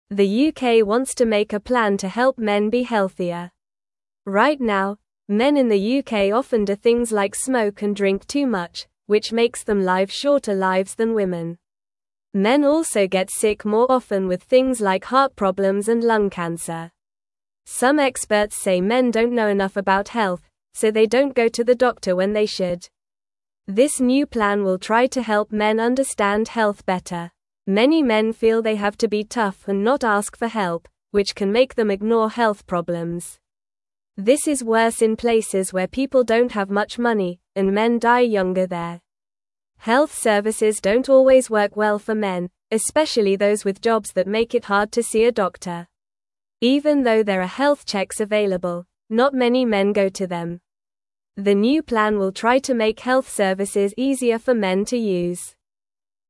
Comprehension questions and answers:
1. The UK wants to make a plan to (1)______ men be healthier.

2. Right now, men in the UK often do things like smoke and drink too much, which (2)______ them live shorter lives than women.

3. Some experts say men don't know (3)______ about health, so they don't go to the doctor when they should.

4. (4)______ men feel they have to be tough and not ask for help, which can make them (5)______ health problems.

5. (4)______ men feel they have to be tough and not ask for help, which can make them (5)______ health problems.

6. This is (6)______ in places where people don't have much money, and men die younger there.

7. Even though there are health checks (7)______, not many men go to them.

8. The new plan will try to make health services (8)______ for men to use.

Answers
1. help
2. makes
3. enough
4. Many
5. ignore
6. worse
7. available
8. easier

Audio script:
The UK wants to make a plan to help men be healthier. Right now, men in the UK often do things like smoke and drink too much, which makes them live shorter lives than women. Men also get sick more often with things like heart problems and lung cancer. Some experts say men don't know enough about health, so they don't go to the doctor when they should. This new plan will try to help men understand health better.
Many men feel they have to be tough and not ask for help, which can make them ignore health problems. This is worse in places where people don't have much money, and men die younger there. Health services don't always work well for men, especially those with jobs that make it hard to see a doctor. Even though there are health checks available, not many men go to them. The new plan will try to make health services easier for men to use.

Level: Level 1